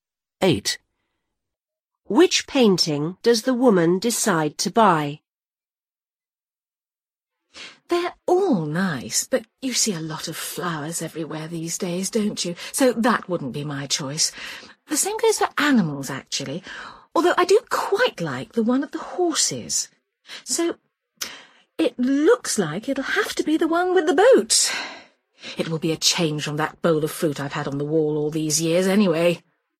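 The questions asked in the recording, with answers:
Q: Which painting does the woman decide to buy?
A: The one with the boat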